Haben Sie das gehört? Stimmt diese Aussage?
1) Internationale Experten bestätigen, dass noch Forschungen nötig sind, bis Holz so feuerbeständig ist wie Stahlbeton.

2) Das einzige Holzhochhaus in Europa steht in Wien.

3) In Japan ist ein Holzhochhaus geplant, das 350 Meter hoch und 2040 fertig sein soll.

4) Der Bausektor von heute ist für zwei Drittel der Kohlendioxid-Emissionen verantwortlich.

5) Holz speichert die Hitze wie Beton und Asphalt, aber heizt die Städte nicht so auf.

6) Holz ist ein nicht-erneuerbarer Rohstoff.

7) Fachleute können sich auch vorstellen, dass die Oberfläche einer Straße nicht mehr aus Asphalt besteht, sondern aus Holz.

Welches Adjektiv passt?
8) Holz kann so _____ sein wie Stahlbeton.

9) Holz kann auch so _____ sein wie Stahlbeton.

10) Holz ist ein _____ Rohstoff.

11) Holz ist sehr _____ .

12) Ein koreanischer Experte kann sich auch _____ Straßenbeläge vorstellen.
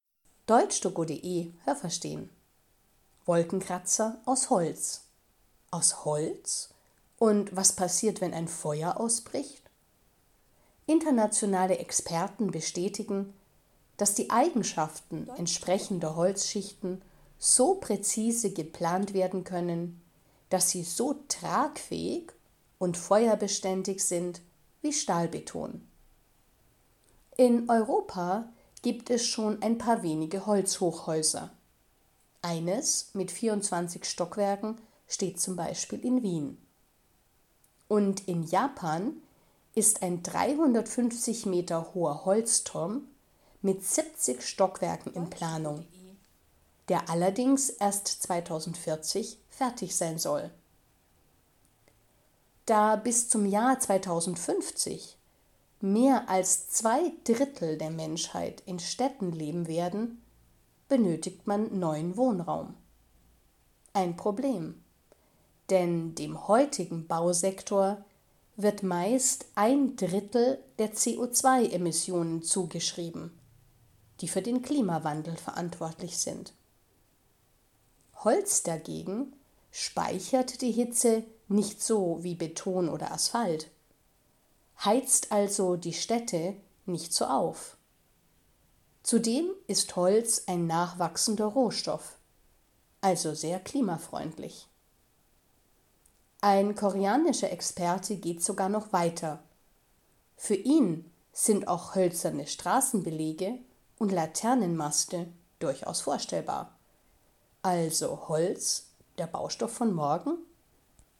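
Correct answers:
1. falsch
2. falsch
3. richtig
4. falsch
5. falsch
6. falsch
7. richtig
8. tragfähig
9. feuerbeständig
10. nachwachsender
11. klimafreundlich
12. hölzerne

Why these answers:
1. Experten sind schon heute in der Lage, Holzschichten entsprechend zu planen.
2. In Europa gibt es noch ein paar andere, Wien ist nur ein Beispiel.
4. Er ist für ein Drittel der Kohlendioxid-Emissionen verantwortlich.
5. Holz heizt die Städte nicht so auf, weil es die Hitze nicht so speichert wie Beton und Asphalt.
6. Er ist genau das Gegenteil, nämlich ein nachwachsender Rohstoff.

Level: Hörtexte B (mittel)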